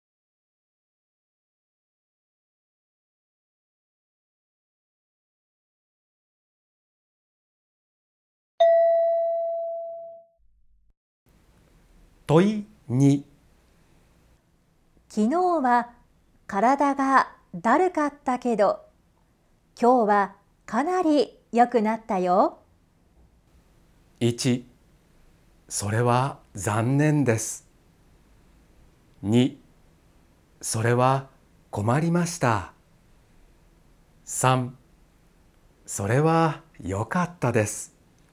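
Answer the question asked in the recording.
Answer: 3: それは良かったです。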